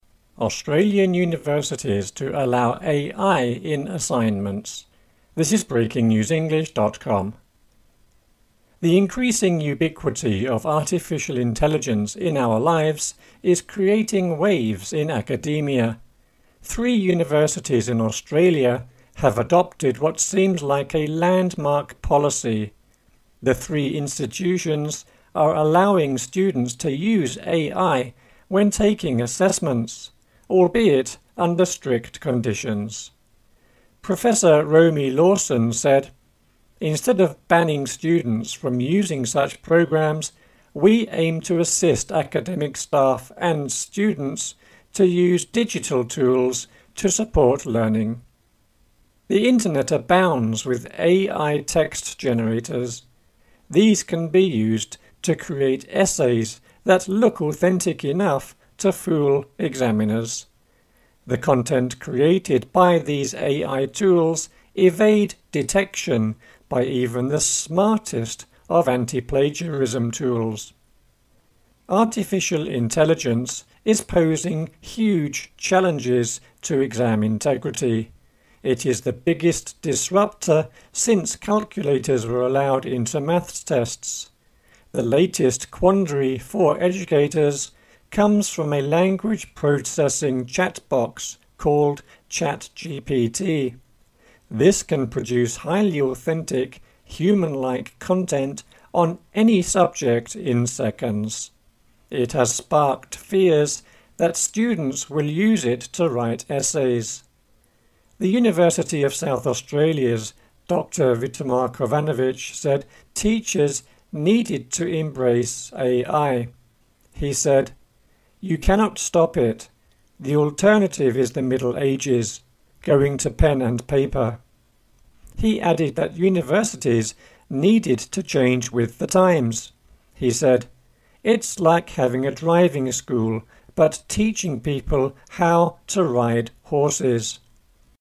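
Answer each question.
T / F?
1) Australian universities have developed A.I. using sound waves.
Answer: F

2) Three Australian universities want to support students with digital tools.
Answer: T

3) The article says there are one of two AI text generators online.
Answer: F

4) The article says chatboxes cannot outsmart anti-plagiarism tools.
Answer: F

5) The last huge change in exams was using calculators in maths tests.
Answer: T

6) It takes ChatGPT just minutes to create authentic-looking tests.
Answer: F

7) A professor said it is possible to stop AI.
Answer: F

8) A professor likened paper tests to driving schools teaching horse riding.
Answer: T

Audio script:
The increasing ubiquity of artificial intelligence in our lives is creating waves in academia. Three universities in Australia have adopted what seems like a landmark policy. The three institutions are allowing students to use AI when taking assessments, albeit under strict conditions. 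Professor Romy Lawson said: "Instead of banning students from using such programs, we aim to assist academic staff and students to use digital tools to support learning." The Internet abounds with AI text generators. These can be used to create essays that look authentic enough to fool examiners. The content created by these AI tools evade detection by even the smartest of anti-plagiarism tools.
Artificial Intelligence is posing huge challenges to exam integrity. It is the biggest disruptor since calculators were allowed into maths tests. The latest quandary for educators comes from a language processing chatbox called ChatGPT. This can produce highly authentic human-like content on any subject in seconds. It has sparked fears that students will use it to write essays. The University of South Australia's Dr Vitomir Kovanovic said teachers needed to embrace AI. He said: "You cannot stop it. 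The alternative is the Middle Ages – going to pen and paper." He added that universities needed to change with the times. He said: "It's like having a driving school, but teaching people how to ride horses."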